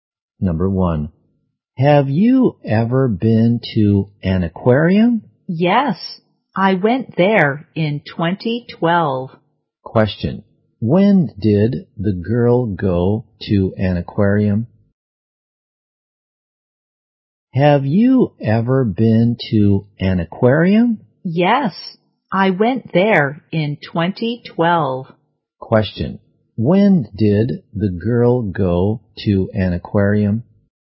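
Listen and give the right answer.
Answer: In 2012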